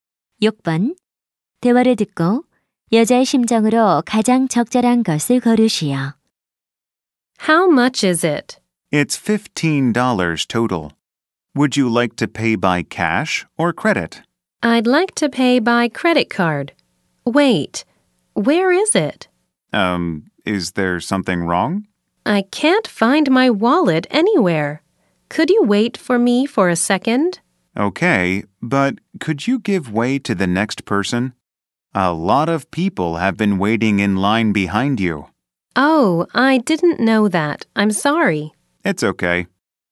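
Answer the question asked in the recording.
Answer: 당황스러움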